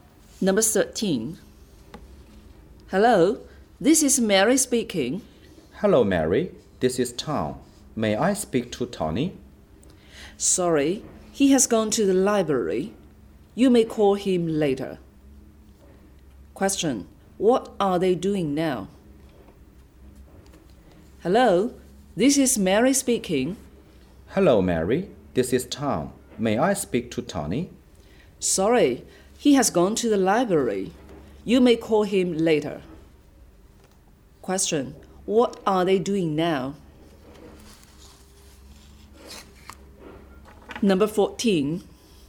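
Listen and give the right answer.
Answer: Talking on the phone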